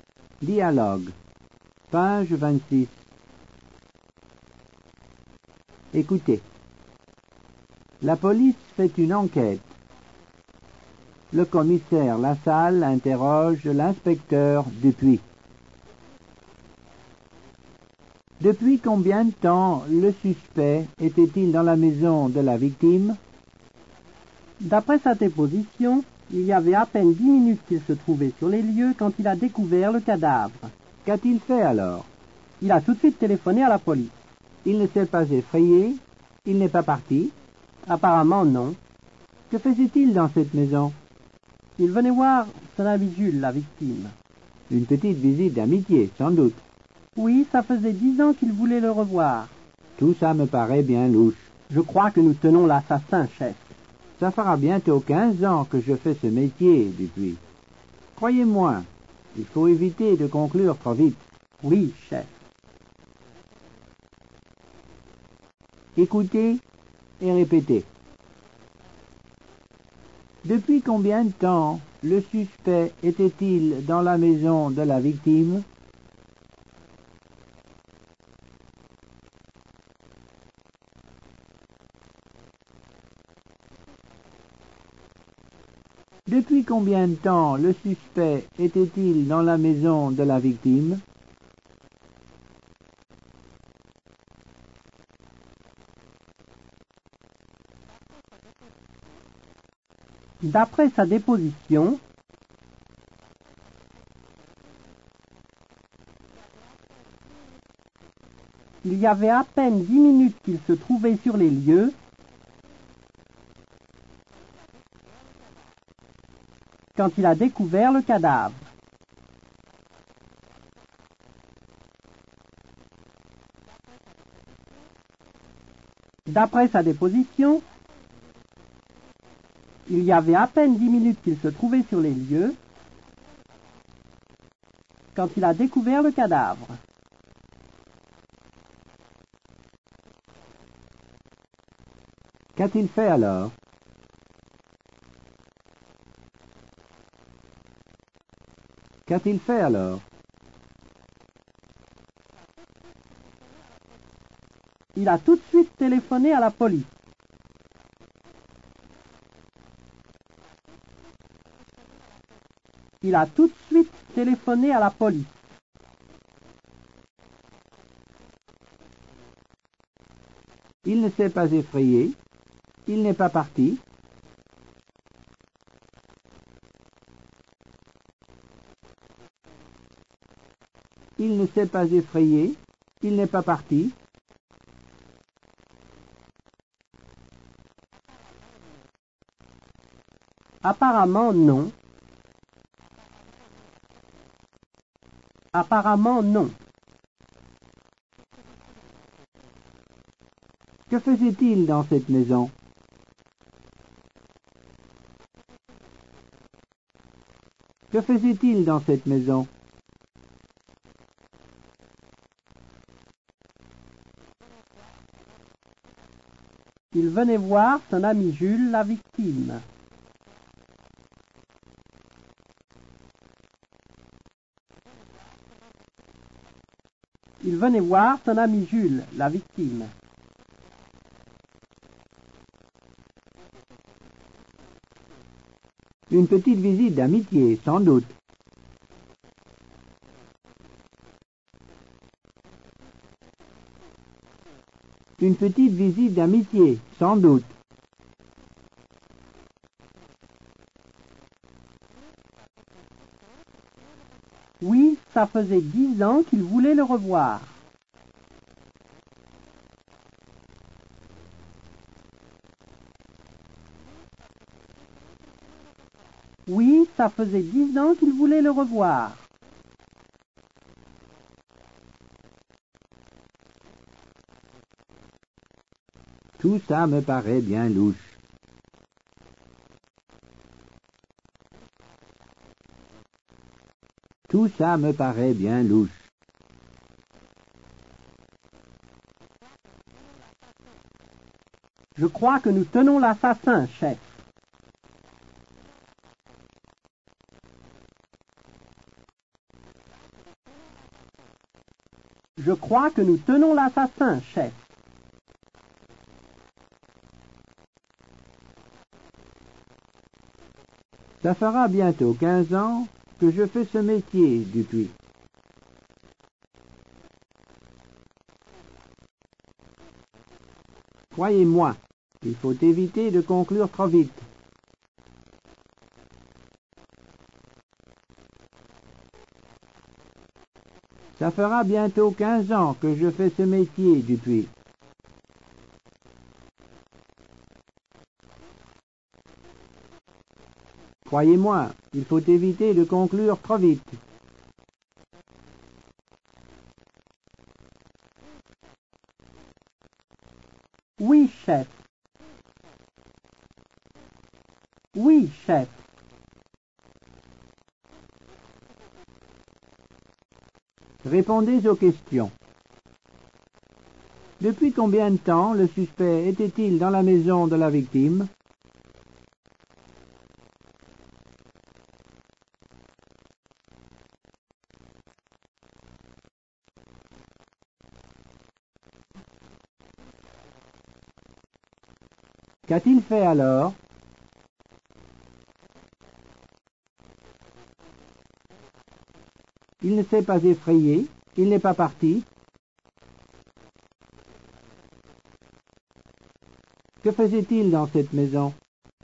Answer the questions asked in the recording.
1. D'après sa déposition, il y avait à peine 10 minutes qu'il se trouvait sur les lieux quand il a découvert le cadavre.
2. Il a tout de suite téléphoné à la police.
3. Apparemment, non.
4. Il venait voir son ami Jules, la victime.